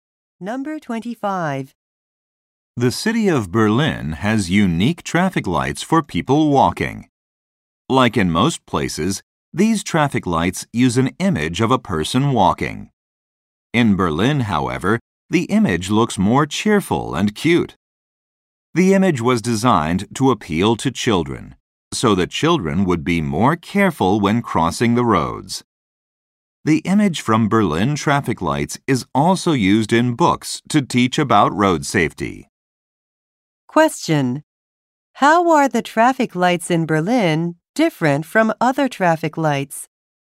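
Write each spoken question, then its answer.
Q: How are the traffic lights in Berlin different from other traffic lights?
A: The walking figure looks more cheerful and cute.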